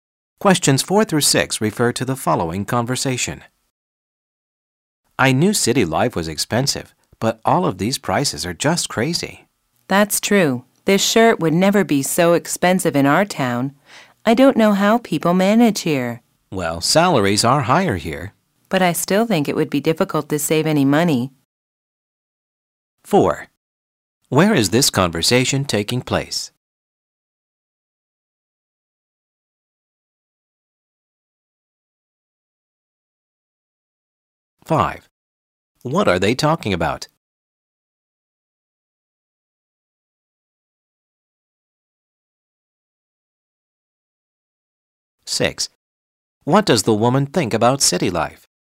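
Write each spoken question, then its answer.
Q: What are they talking about?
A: High prices in the city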